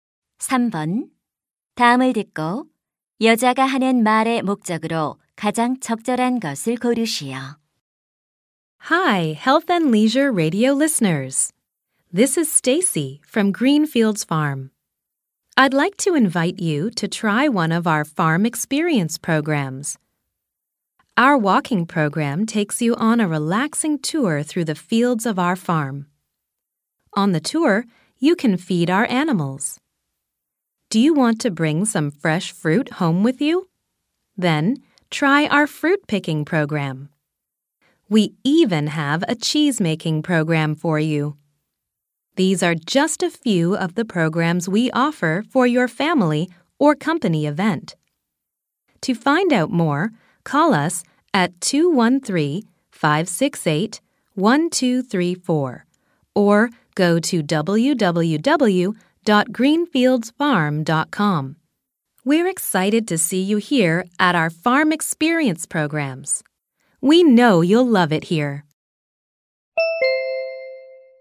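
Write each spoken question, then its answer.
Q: 다음을 듣고 여자가 하는 말의 목적으로 가장 적절한 것을 고르시오.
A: 농장 체험 프로그램 홍보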